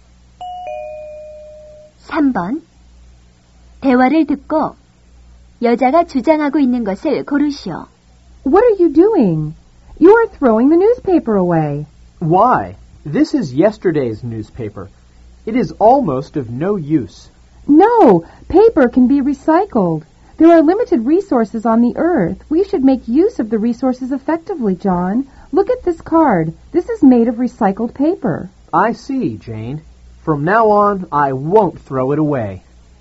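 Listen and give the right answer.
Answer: 종이를 재활용해서 자원을 효율적으로 써야 한다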